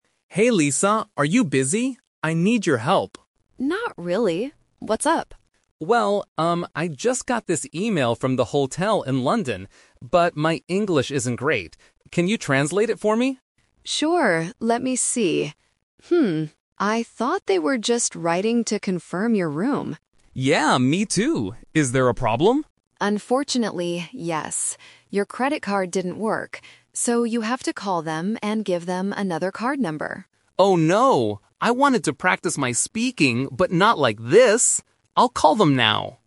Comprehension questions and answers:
Listen to the conversation and circle the correct answer (A, B, or C).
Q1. What does Tom want Lisa to do?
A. Write an email for him.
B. Translate an email he received.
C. Pay for his hotel room.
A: Translate an email he received.

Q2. What did they originally think the email was about?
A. Asking for a new credit card.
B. Canceling Tom's vacation.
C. Confirming Tom's hotel room.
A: Confirming Tom's hotel room.

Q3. What does Tom need to do to fix the problem?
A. Call the hotel.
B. Practice his English.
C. Go to the bank.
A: Call the hotel.

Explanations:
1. Tom says, "I just got this email... Can you translate it for me?"
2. Lisa says, "I thought they were just writing to confirm your room," and Tom agrees by saying, "Yeah, me too!"
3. Lisa tells Tom, "So, you have to call them and give them another card number." Tom then confirms, "I'll call them now."

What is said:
Tom: Hey Lisa, are you busy? I need your help.
Lisa: Not really. What's up?
Tom: Well, um, I just got this email from the hotel in London. But my English isn't great. Can you translate it for me?
Lisa: Sure, let me see... I thought they were just writing to confirm your room.
Tom: Yeah, me too! Is there a problem?
Lisa: Unfortunately, yes. Your credit card didn't work. So, you have to call them and give them another card number.
Tom: Oh no! I wanted to practice my speaking, but not like this! I'll call them now.

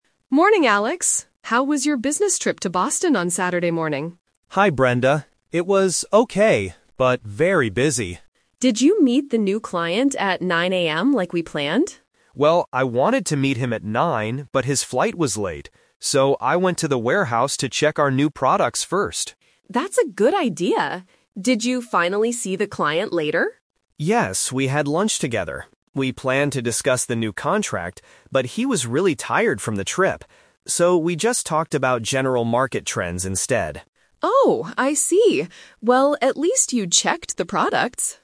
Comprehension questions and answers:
Listen to the conversation between two sales employees. Then, circle the correct answer for each question.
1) What did Alex do first on Saturday morning?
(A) He met the new client.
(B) He went to the airport.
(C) He checked the new products.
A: He checked the new products.

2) Why didn't Alex meet the client at 9 AM?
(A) Because the client's flight was late.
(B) Because Alex had to go to the warehouse.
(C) Because the client forgot the meeting.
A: Because the client's flight was late.

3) What did Alex and the client talk about at lunch?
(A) The new contract.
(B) General market trends.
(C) The new products.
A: General market trends.

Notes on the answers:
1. Alex says, "So, I went to the warehouse to check our new products first." Option (A) is the trap; he planned to meet the client first, but the plan changed. Option (B) is a plausible distracter because a flight is mentioned, but he didn't go to the airport.
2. Alex explicitly states the reason: "but his flight was late." Option (B) is a trap; going to the warehouse was the result of the flight being late, not the reason they couldn't meet. Option (C) is never mentioned.
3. Alex says, "So, we just talked about general market trends instead." Option (A) is the trap (The Twist); they planned to discuss the new contract, but didn't because the client was tired. Option (C) is a distracter using information from earlier in the audio.

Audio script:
Brenda: Morning, Alex. How was your business trip to Boston on Saturday morning?
Alex: Hi, Brenda. It was okay, but very busy.
Brenda: Did you meet the new client at 9 AM like we planned?
Alex: Well, I wanted to meet him at 9, but his flight was late. So, I went to the warehouse to check our new products first.
Brenda: That's a good idea. Did you finally see the client later?
Alex: Yes, we had lunch together. We planned to discuss the new contract, but he was really tired from the trip. So, we just talked about general market trends instead.

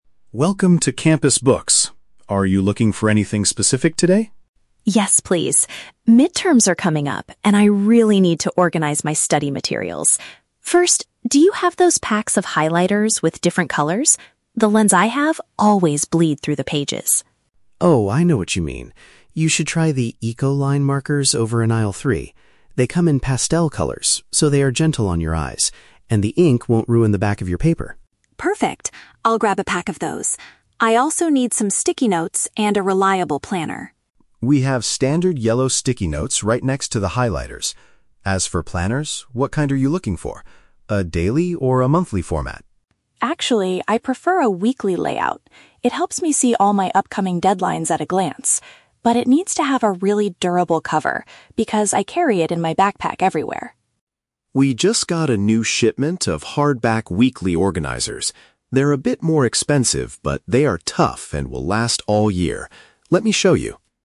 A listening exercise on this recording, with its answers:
Listen to the conversation between a student and a bookstore clerk, then choose the correct answer (A, B, or C) for each question.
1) Why does Emma want to buy a new set of highlighters?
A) She lost the markers she bought at the beginning of the semester.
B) Her current ones damage the other side of the textbook pages.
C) She prefers using bright, neon colors for her study notes.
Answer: Her current ones damage the other side of the textbook pages.

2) Where can Emma find the sticky notes?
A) Beside the markers in the third aisle.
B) Near the new shipment of books at the front desk.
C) On the bottom shelf below the daily calendars.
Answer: Beside the markers in the third aisle.

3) What specific feature is Emma looking for in a planner?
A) It must contain a broad monthly overview calendar.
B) It has to be very inexpensive and lightweight to carry.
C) It needs to have a tough, protective outside material.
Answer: It needs to have a tough, protective outside material.

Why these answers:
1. Emma says her current highlighters "bleed through the pages." Option B perfectly paraphrases this as "damage the other side of the textbook pages." Option A is not mentioned. Option C is a trap; the clerk mentions the new markers are "pastel colors," not neon, and color is not the primary reason she is replacing her old ones.
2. The clerk says the sticky notes are "right next to the highlighters," and earlier mentioned the highlighters are in "aisle three." Option A accurately combines this information. Option B is a trap; the "new shipment" refers to the planners, not the sticky notes. Option C is a plausible guess but is never mentioned.
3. Emma states her planner "needs to have a really durable cover." Option C paraphrases "durable cover" as "tough, protective outside material." Option A is a trap; the clerk asks if she wants a monthly format, but she specifically says she prefers a "weekly layout." Option B is a trap; the clerk mentions the hardback organizers are "a bit more expensive," so she is not looking for the cheapest option.

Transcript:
Clerk: Welcome to Campus Books. Are you looking for anything specific today?
Emma: Yes, please. Midterms are coming up, and I really need to organize my study materials. First, do you have those packs of highlighters with different colors? The ones I have always bleed through the pages.
Clerk: Oh, I know what you mean. You should try the 'Eco-Line' markers over in aisle three. They come in pastel colors, so they are gentle on your eyes, and the ink won't ruin the back of your paper.
Emma: Perfect, I'll grab a pack of those. I also need some sticky notes and a reliable planner.
Clerk: We have standard yellow sticky notes right next to the highlighters. As for planners, what kind are you looking for? A daily or a monthly format?
Emma: Actually, I prefer a weekly layout. It helps me see all my upcoming deadlines at a glance. But it needs to have a really durable cover because I carry it in my backpack everywhere.
Clerk: We just got a new shipment of hardback weekly organizers. They're a bit more expensive, but they are tough and will last all year. Let me show you.

